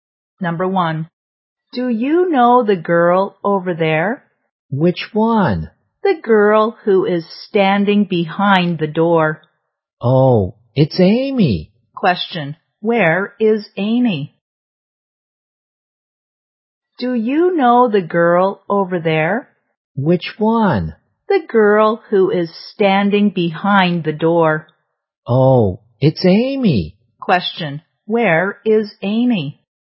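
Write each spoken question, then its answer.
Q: where is Amy?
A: Behind the door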